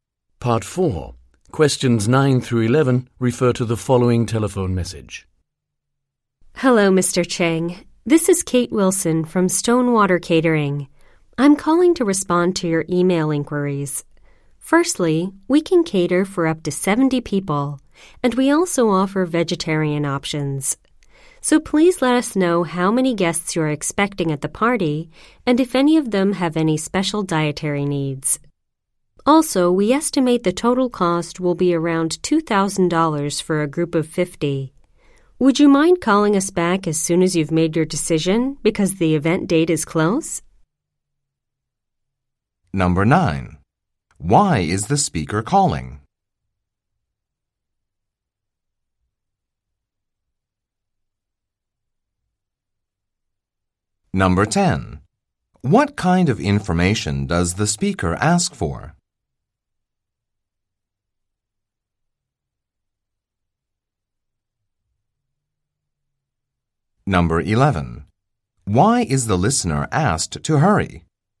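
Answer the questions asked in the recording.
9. To respond to Mr. Cheng's email inquiries about catering
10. The number of guests and any special dietary needs
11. Because the event date is close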